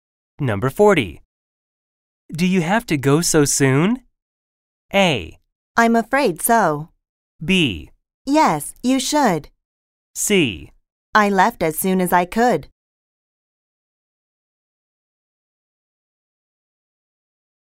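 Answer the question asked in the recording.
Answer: A: I'm afraid so.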